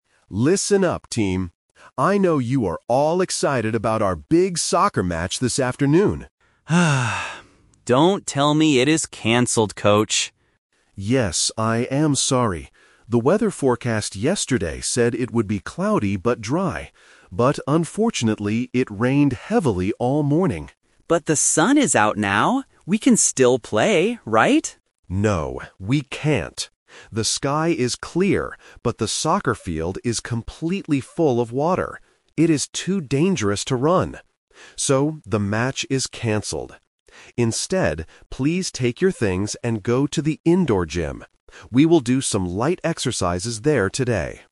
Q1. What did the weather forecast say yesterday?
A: It would be cloudy but dry.

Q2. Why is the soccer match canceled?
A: Because the soccer field is full of water.

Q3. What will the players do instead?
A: They will do exercises in the gym.

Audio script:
I know you are all excited about our big soccer match this afternoon.
Player: (Sighs) Don't tell me it is canceled, Coach.
Coach: Yes, I am sorry. The weather forecast yesterday said it would be cloudy but dry. But unfortunately, it rained heavily all morning.
Player: But the sun is out now! We can still play, right?
Coach: No, we can't. The sky is clear, but the soccer field is completely full of water. It is too dangerous to run. So, the match is canceled. Instead, please take your things and go to the indoor gym. We will do some light exercises there today.